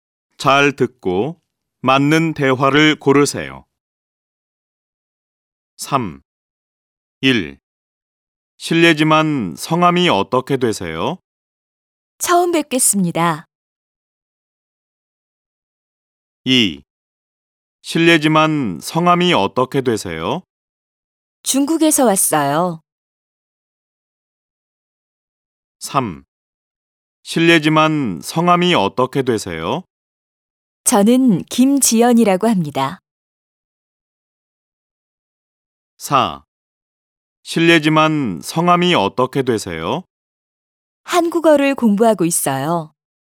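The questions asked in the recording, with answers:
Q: 실례지만 성함이 어떻게 되세요?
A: 3: 저는 김지연이라고 합니다.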